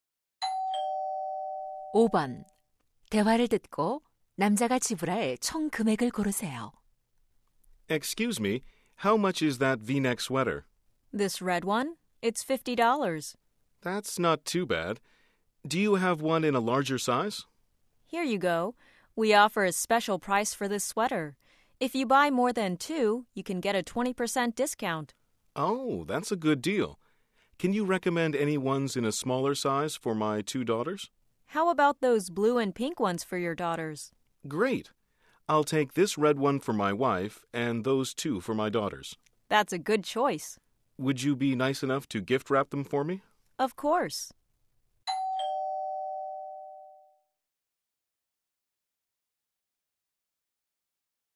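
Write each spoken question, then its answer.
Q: 대화를 듣고 남자가 지불할 총 금액을 고르세요.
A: 120달러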